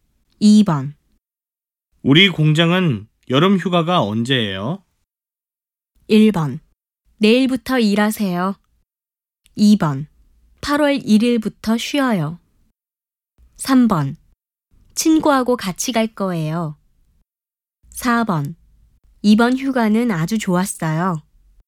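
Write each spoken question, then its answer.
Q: 우리 공장은 여름 휴가가 언제예요?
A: 2: 8월 1일부터 쉬어요.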